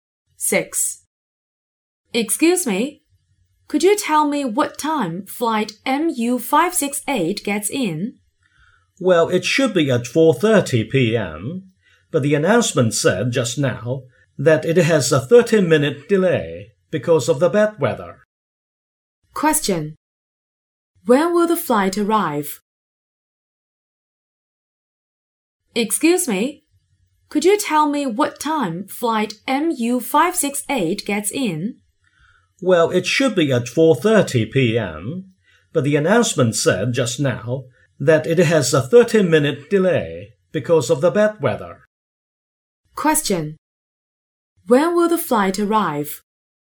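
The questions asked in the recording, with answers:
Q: Question. When will the flight arrive?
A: At 5:00 p.m.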